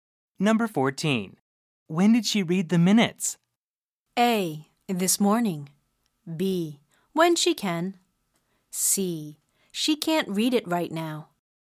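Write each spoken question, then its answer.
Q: When did she read the minutes?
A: A: This morning.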